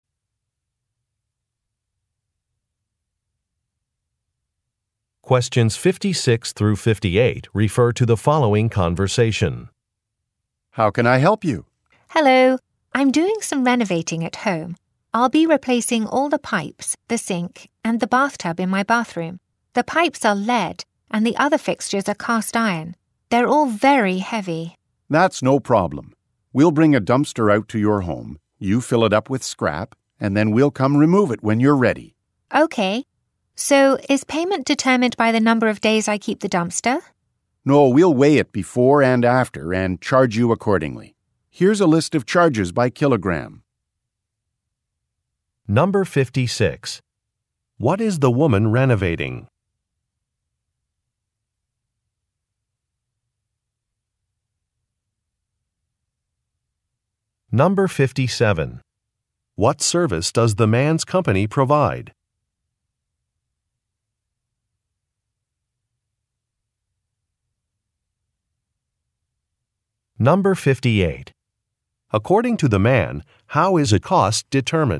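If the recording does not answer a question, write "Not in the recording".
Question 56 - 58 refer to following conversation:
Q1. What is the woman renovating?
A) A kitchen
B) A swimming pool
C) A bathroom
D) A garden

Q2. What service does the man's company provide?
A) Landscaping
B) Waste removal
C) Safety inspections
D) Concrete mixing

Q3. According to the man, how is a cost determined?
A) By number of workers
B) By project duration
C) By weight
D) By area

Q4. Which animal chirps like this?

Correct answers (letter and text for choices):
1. C) A bathroom
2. B) Waste removal
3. C) By weight
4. Not in the recording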